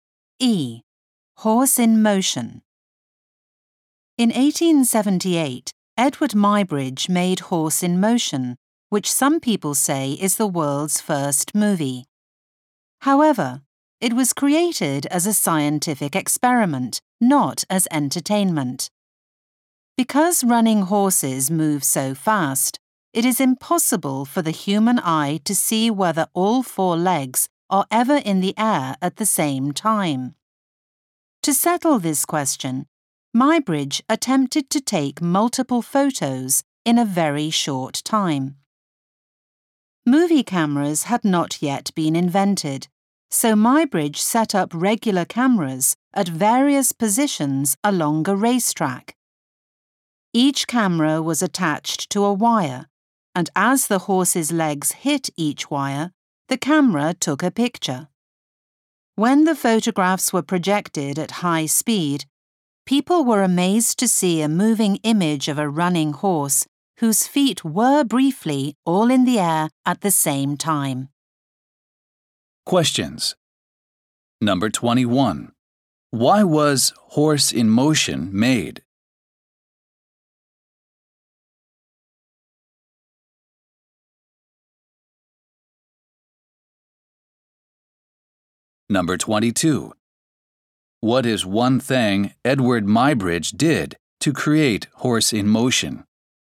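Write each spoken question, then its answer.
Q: Why was Horse in Motion made?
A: As a scientific experiment to see whether all four legs of a running horse are ever off the ground together.

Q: What is one thing Edward Muybridge did to create Horse in Motion?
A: He set up ordinary cameras along a racetrack, each set off by a wire.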